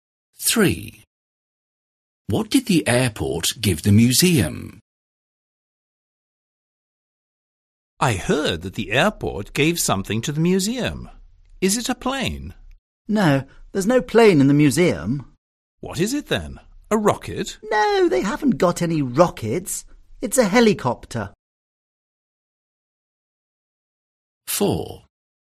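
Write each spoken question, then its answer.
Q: What did the airport give the museum?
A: a helicopter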